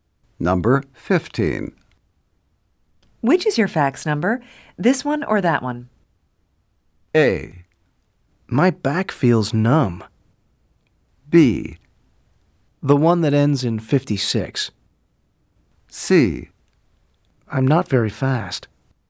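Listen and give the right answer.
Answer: B: The one that ends in 56.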